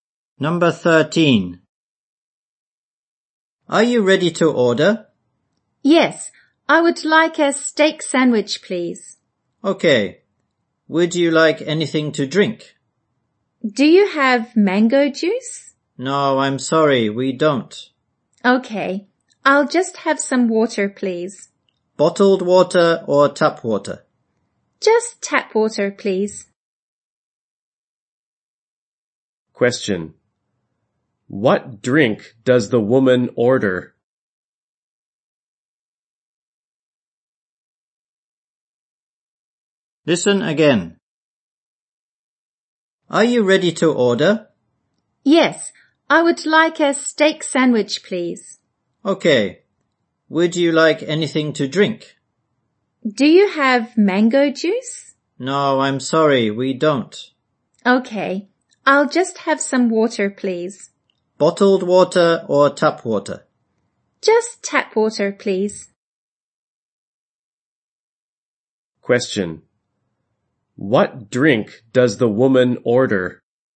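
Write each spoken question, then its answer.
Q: What drink does the woman order?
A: Tap water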